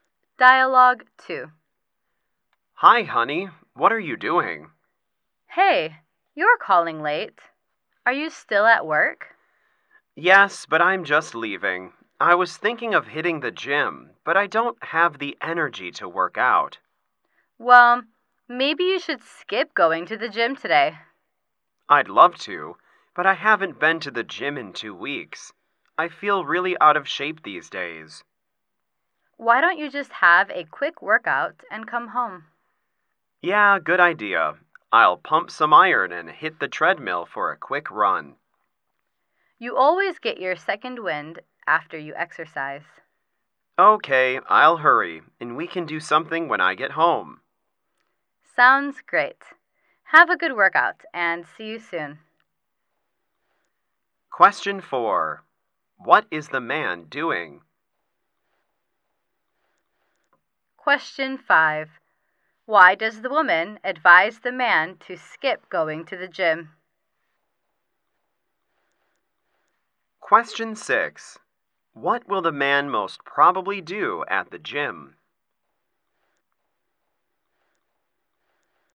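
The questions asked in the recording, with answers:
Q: Why does the woman advise the man to skip going to the gym?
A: He doesn't have the energy to work out

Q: What will the man most probably do at the gym?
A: Lift weights and run on the treadmill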